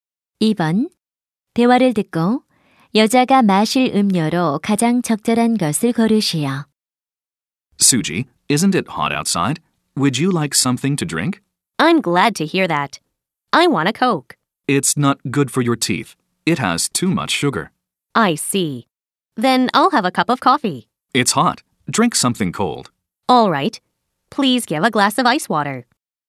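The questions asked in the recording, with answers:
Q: 대화를 듣고 여자가 마실 음료로 가장 적절한 것을 고르시오.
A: 얼음물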